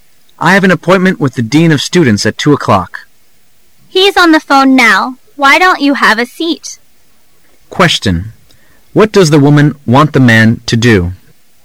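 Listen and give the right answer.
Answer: Sit down and wait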